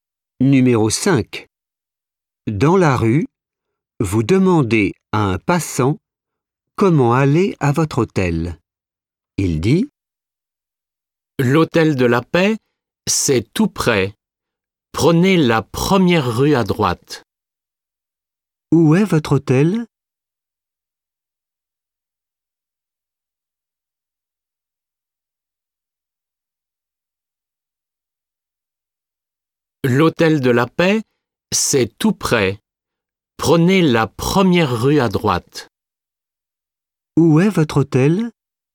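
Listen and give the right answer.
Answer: Tout près, première rue à droite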